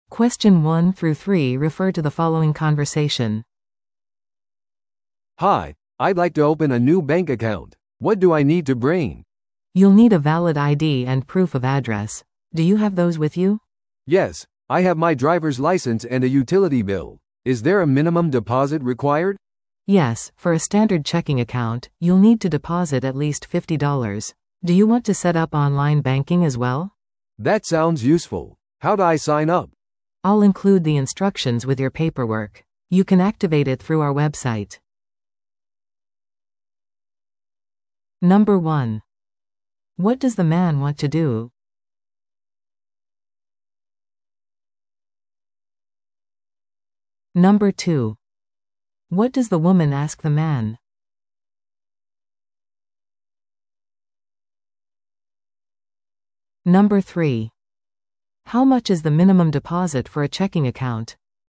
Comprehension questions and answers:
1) What does the man want to do?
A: 銀行口座を開設する

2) What does the woman ask the man?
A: 有効な身分証明書を持っているかどうか

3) How much is the minimum deposit for a checking account?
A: 50ドル

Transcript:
A: "Hi, I'd like to open a new bank account. What do I need to bring?"
B: "You'll need a valid ID and proof of address. Do you have those with you?"
A: "Yes, I have my driver's license and a utility bill. Is there a minimum deposit required?"
B: "Yes, for a standard checking account, you'll need to deposit at least fifty dollars. Do you want to set up online banking as well?"
A: "That sounds useful. How do I sign up?"
B: "I'll include the instructions with your paperwork. You can activate it through our website."